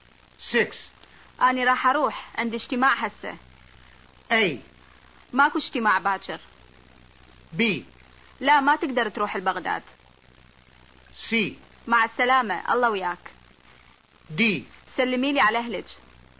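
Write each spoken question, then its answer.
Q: أنا راح أروح عند اجتماع هسه.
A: C: مع السلامة الله وياك.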